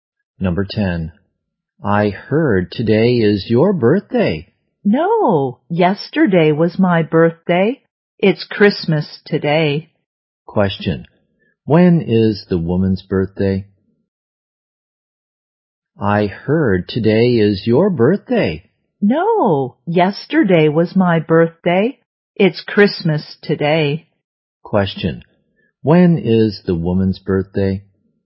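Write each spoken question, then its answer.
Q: when is the woman's birthday?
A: Yesterday (Christmas Eve)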